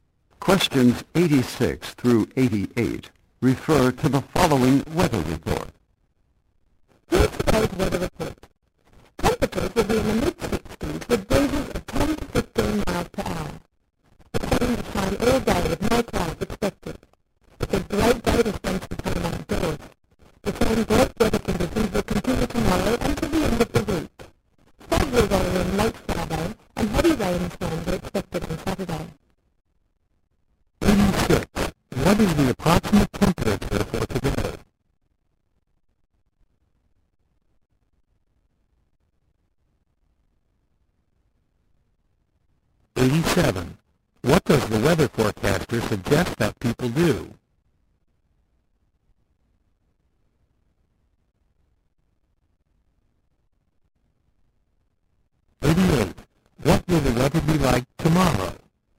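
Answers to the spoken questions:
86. In the mid-60s
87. Spend time outdoors
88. The same: sunny and mild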